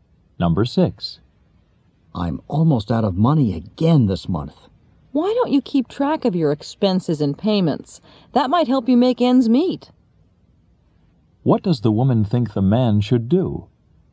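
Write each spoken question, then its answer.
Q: What does the woman think the man should do?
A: Keep track of his expenses and payments.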